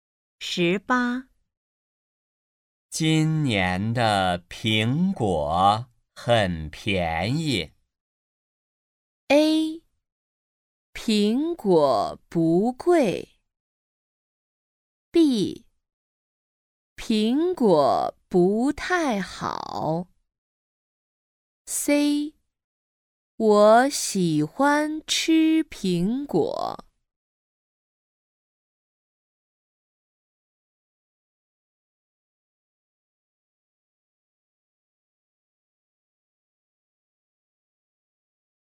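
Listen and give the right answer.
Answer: A: 苹果不贵。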